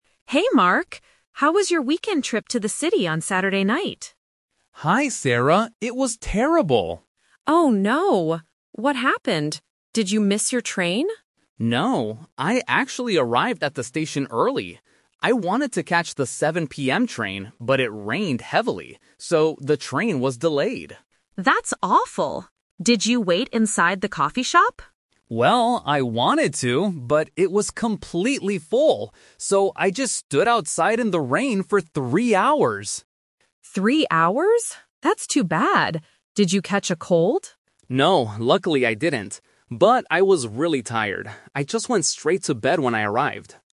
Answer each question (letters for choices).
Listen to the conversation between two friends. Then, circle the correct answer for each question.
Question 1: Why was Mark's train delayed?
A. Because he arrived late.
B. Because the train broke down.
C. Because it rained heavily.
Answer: C

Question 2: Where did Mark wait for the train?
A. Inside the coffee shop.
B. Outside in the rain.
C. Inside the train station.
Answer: B

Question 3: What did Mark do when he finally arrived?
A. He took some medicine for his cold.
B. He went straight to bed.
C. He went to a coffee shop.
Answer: B

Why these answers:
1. Mark explicitly says, "...but it rained heavily. So, the train was delayed." Option (A) is the trap; Sarah asks if he missed the train, but he says he arrived early. Option (B) is a common reason for a delay, but it is not mentioned.
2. Mark explains his situation: "So, I just stood outside in the rain for three hours!" Option (A) is the trap (The Twist); Sarah asks if he waited inside the coffee shop, and he wanted to, but it was full. Option (C) is a plausible distracter, but he specifically says he stood outside.
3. Mark states clearly at the end: "I just went straight to bed when I arrived." Option (A) is the trap; Sarah asks if he caught a cold, but he says "No, luckily I didn't." Option (C) uses a location from earlier in the audio.

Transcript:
Sarah: Hey, Mark. How was your weekend trip to the city on Saturday night?
Mark: Hi, Sarah. It was terrible!
Sarah: Oh no. What happened? Did you miss your train?
Mark: No, I actually arrived at the station early. I wanted to catch the 7 PM train, but it rained heavily. So, the train was delayed.
Sarah: That's awful. Did you wait inside the coffee shop?
Mark: Well, I wanted to, but it was completely full. So, I just stood outside in the rain for three hours!
Sarah: Three hours? That's too bad. Did you catch a cold?
Mark: No, luckily I didn't. But I was really tired. I just went straight to bed when I arrived.